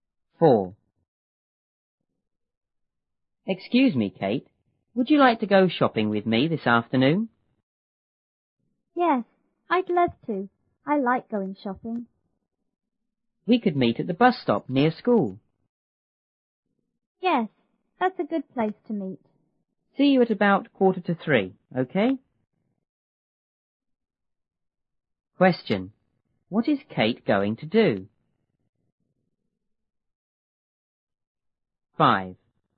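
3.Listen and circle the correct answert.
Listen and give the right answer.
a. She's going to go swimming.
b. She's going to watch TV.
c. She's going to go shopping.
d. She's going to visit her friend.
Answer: c. She's going to go shopping.

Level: 初中英语广州版1B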